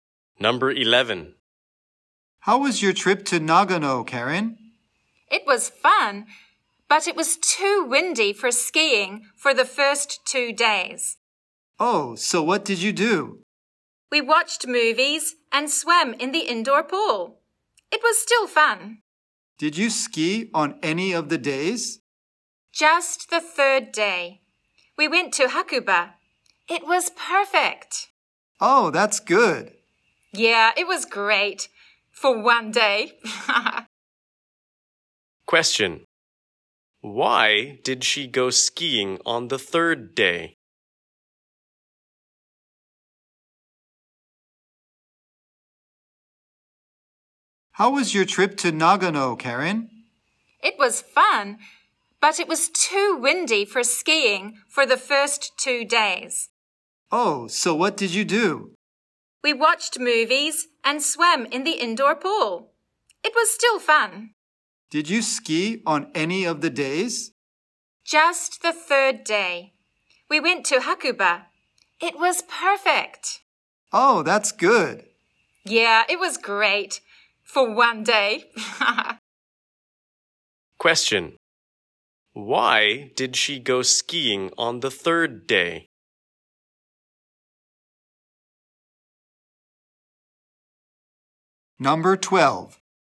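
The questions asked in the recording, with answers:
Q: Why did she go skiing on the third day?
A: The weather was perfect; it wasn't too windy.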